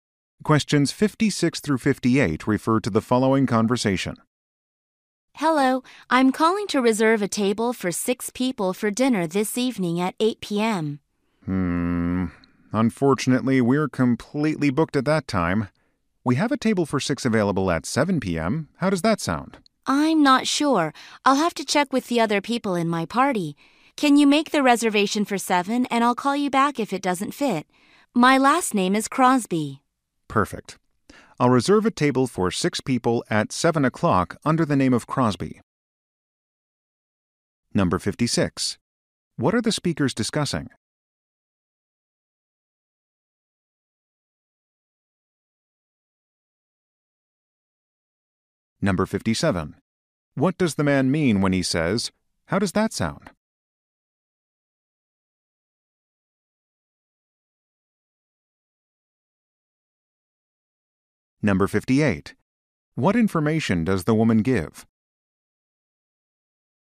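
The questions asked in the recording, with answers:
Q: What are the speakers discussing?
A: A dinner reservation

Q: What does the man mean when he says, "How does that sound?"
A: He is asking if 7 p.m. is acceptable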